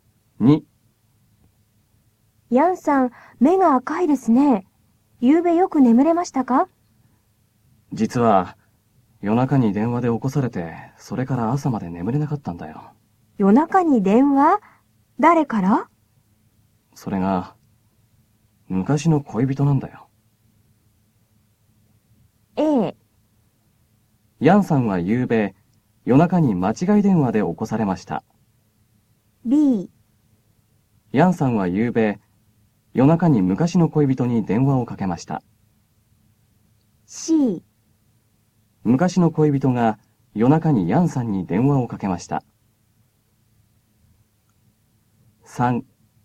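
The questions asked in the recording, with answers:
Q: 昔の恋人が夜中にヤンさんに電話をかけました。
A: C: 昔の恋人が夜中にヤンさんに電話をかけました。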